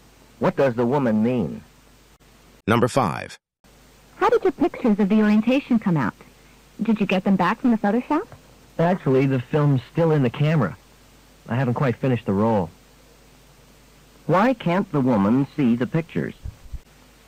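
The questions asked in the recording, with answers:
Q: Why can't the woman see the pictures?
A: The film hasn't been developed because the roll isn't finished.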